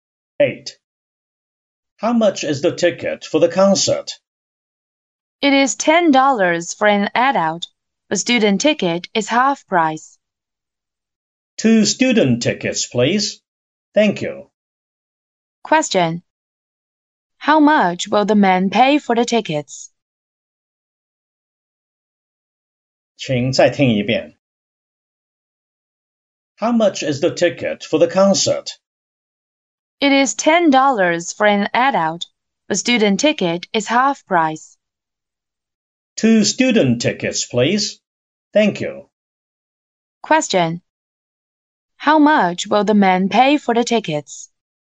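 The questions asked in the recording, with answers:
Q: How much will the man pay for the tickets?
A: $10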